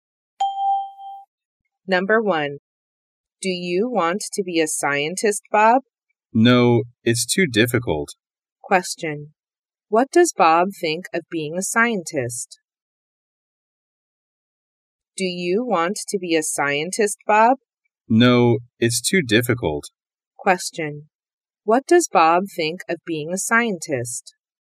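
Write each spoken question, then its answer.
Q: What does Bob think of being a scientist?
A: It's too difficult.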